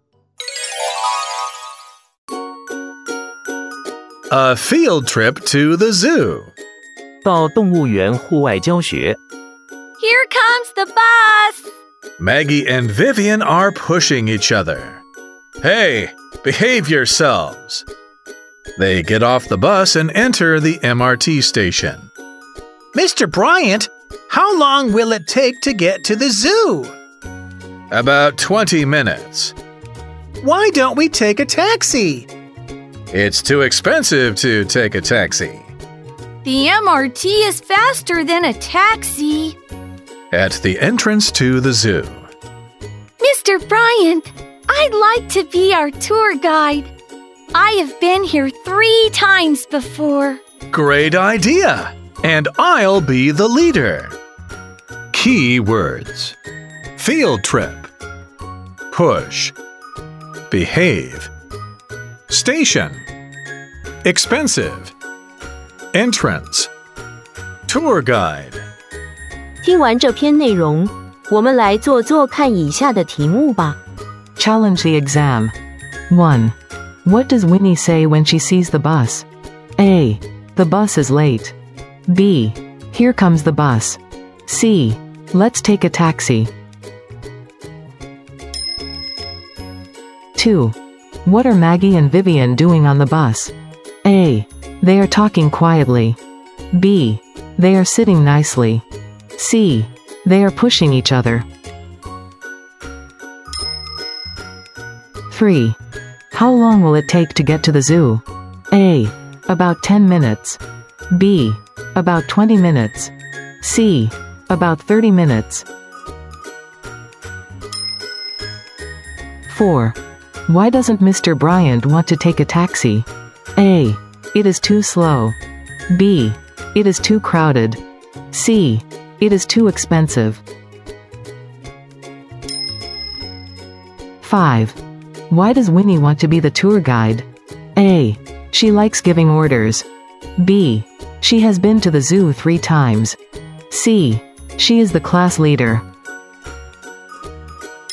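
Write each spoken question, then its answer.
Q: What does Winnie say when she sees the bus?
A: B: Here comes the bus.

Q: What are Maggie and Vivian doing on the bus?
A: C: They are pushing each other.

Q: How long will it take to get to the zoo?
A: B: About 20 minutes.

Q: Why doesn't Mr. Bryant want to take a taxi?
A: C: It is too expensive.

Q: Why does Winnie want to be the tour guide?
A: B: She has been to the zoo 3 times.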